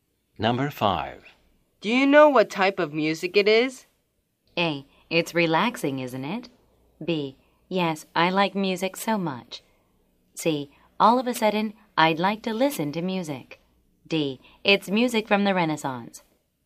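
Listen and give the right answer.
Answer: D: It's music from the Renaissance.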